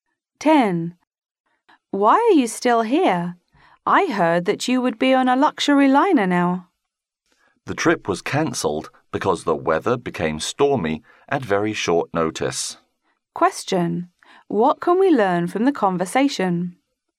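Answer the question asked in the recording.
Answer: The trip was cancelled because of stormy weather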